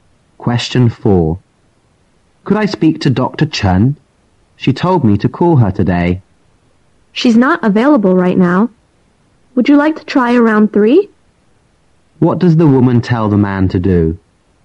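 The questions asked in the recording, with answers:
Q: What does the woman tell the man to do?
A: Call again around 3.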